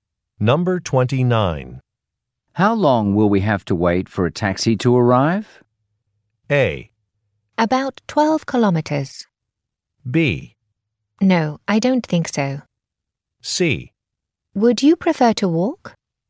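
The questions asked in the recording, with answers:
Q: How long will we have to wait for a taxi to arrive?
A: C: Would you prefer to walk?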